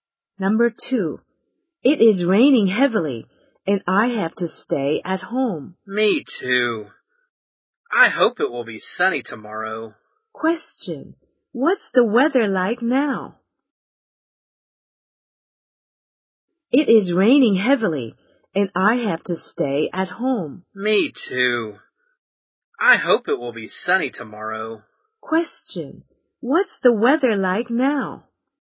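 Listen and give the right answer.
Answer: It's raining heavily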